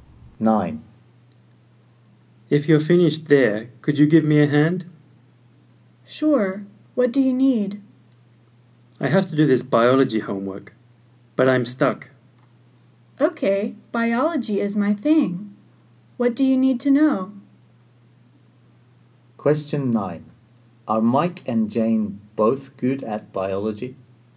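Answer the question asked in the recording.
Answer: No, only one of them is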